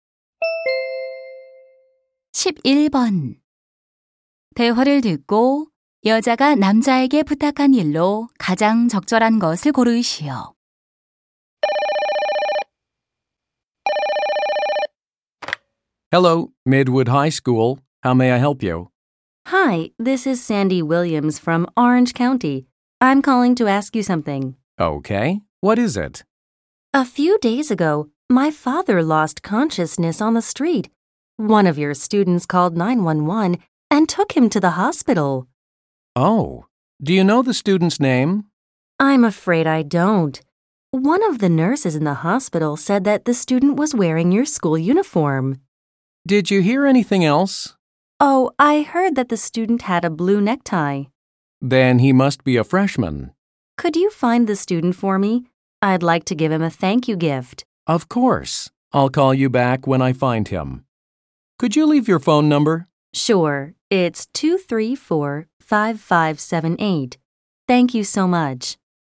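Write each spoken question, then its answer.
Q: 대화를 듣고 여자가 남자에게 부탁한 일로 가장 적절한 것을 고르시오.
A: 아버지를 도와준 학생 찾아 주기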